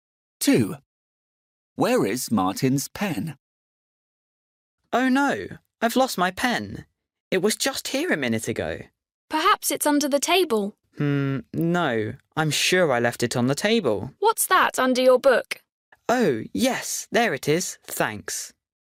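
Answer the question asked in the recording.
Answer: Under his book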